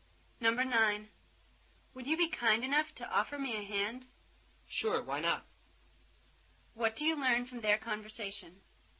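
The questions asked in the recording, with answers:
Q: What do you learn from their conversation?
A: The man is willing to help.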